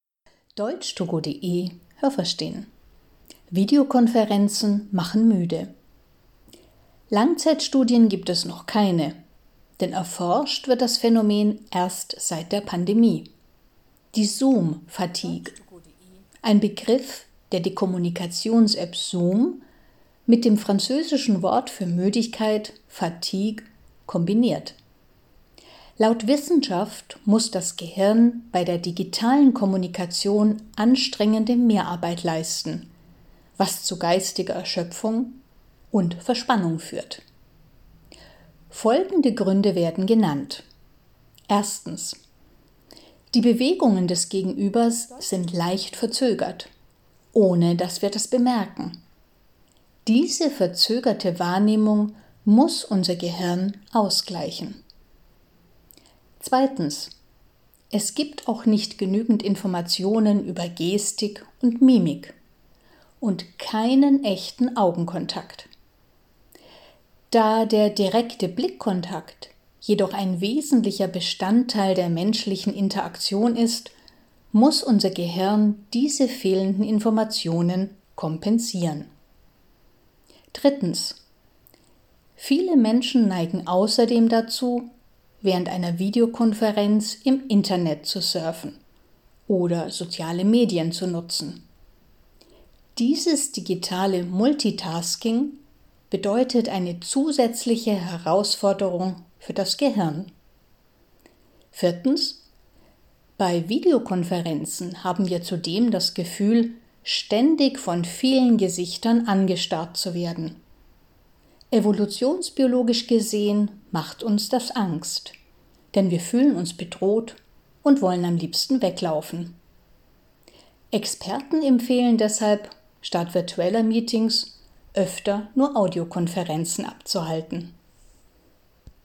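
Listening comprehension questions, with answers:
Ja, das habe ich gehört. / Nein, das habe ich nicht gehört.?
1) „Zoom fatigue" bedeutet geistige Erschöpfung und Verspannung bei Videokonferenzen.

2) Bei Videokonferenzen werden wir schnell müde, weil unser Gehirn weniger arbeitet als normal.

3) Problem 1: Die Bewegungen unseres Gesprächspartners scheinen leicht verzögert zu sein, sind es aber nicht.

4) Problem 2: Bei Videokonferenzen gibt es zwar einen echten Blickkontakt, aber nicht genügend Informationen über die Körpersprache.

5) Problem 3: Bei Videokonferenzen konzentrieren sich die Menschen oft nicht nur auf die Konferenz, sondern surfen parallel dazu im Internet.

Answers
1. Ja, das habe ich gehört.
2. Nein, das habe ich nicht gehört.
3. Nein, das habe ich nicht gehört.
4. Nein, das habe ich nicht gehört.
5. Ja, das habe ich gehört.

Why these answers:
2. Unser Gehirn muss bei Videokonferenzen mehr arbeiten. 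Diese Anstrengung macht müde.
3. Die Bewegungen sind leicht verzögert, wir bemerken das aber nicht.
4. Es gibt auch keinen echten Augenkontakt.

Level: C1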